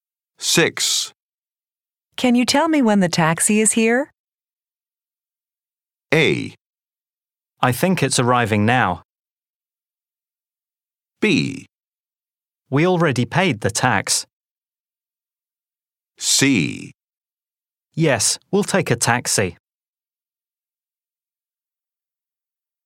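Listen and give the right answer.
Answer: A: I think it's arriving now.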